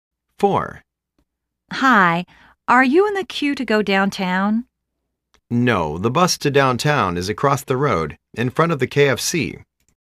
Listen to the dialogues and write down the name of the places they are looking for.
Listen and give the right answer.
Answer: Downtown

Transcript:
A:Hi, are you in the queue to go downtown?
B:No. The bus to downtown is across the road, in front of the KFC.